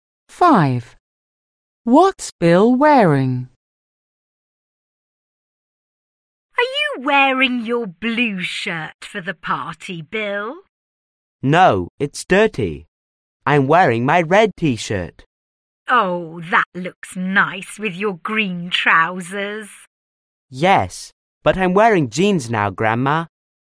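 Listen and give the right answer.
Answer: A red T-shirt and jeans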